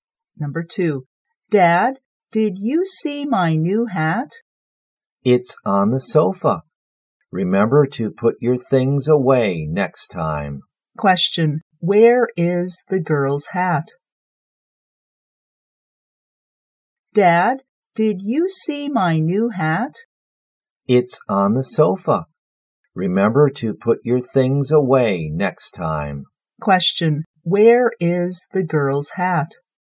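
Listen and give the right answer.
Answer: On the sofa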